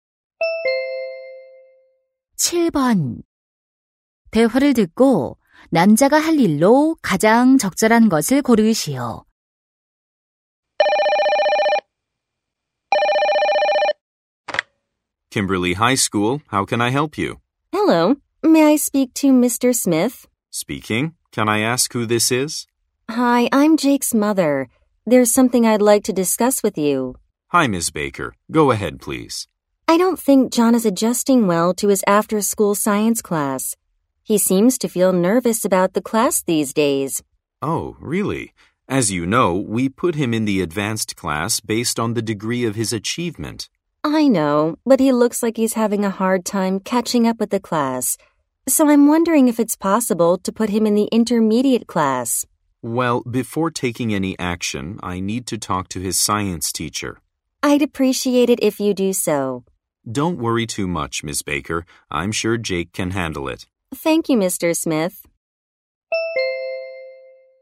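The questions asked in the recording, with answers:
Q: 대화를 듣고 남자가 할 일로 가장 적절한 것을 고르시오.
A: 과학 선생님과 이야기하기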